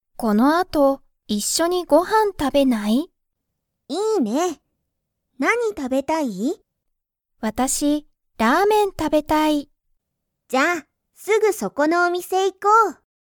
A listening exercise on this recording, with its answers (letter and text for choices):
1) ミキはリサと、一緒(いっしょ)にご飯(はん)を食(た)べますか?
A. はい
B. いいえ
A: A. はい

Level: Level 1